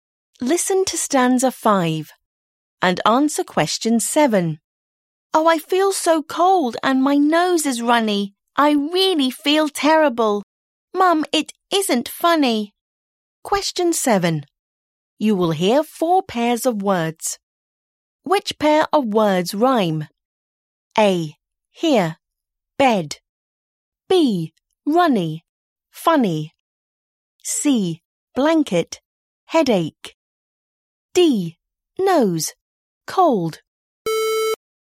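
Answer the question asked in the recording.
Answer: B: Runny. Funny.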